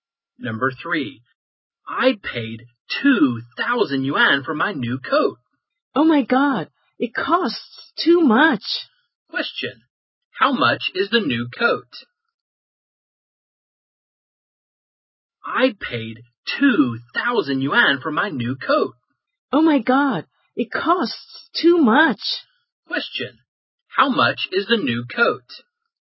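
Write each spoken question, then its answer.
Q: how much is the new coat?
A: 2,000 yuan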